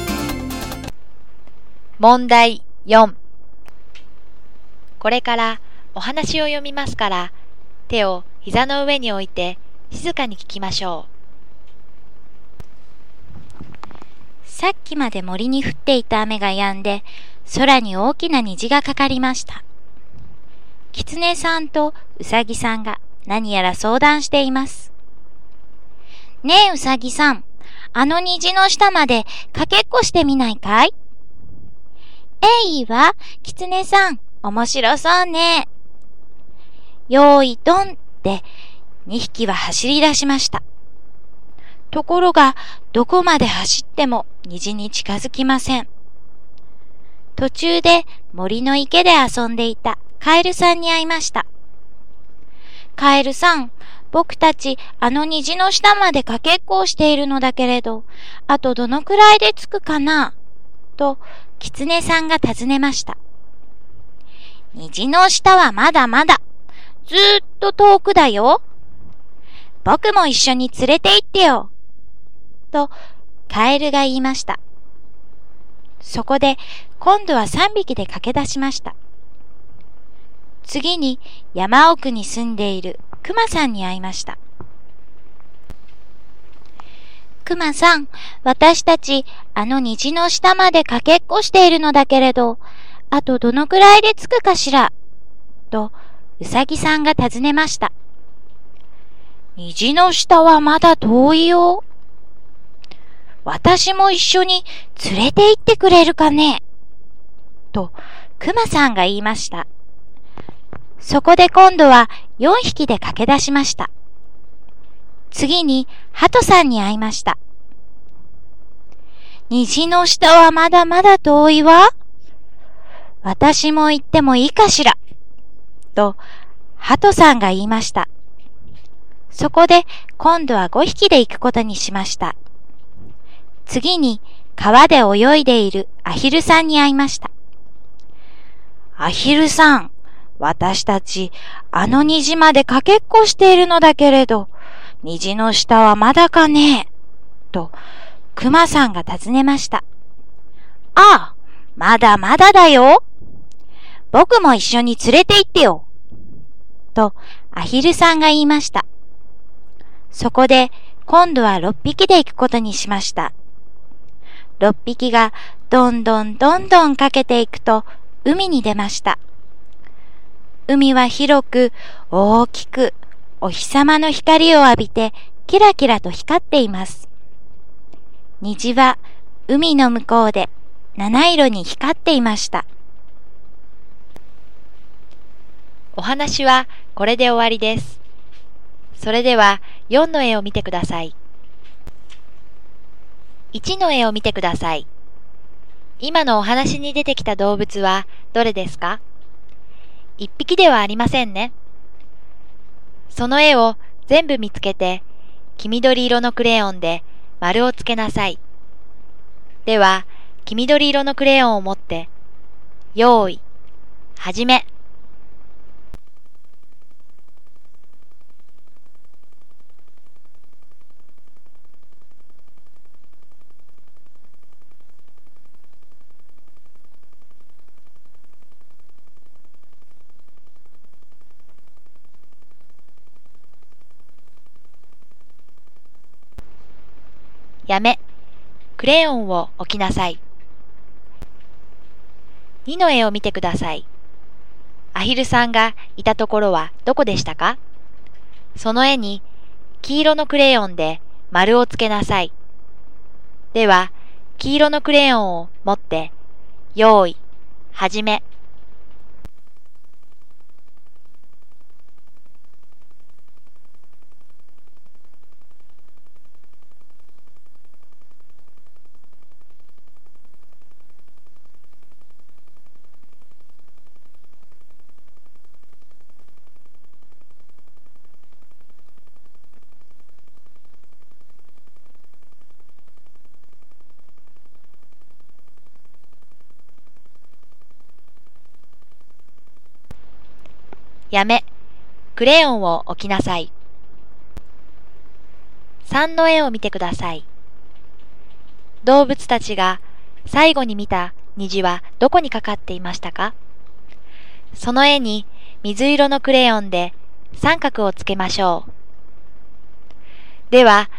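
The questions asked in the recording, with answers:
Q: 今のお話に出てきた動物は、どれですか?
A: キツネ、ウサギ、カエル、クマ、ハト、アヒル

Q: 動物たちが最後に見た 虹はどこにかかっていましたか?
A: 海の向こう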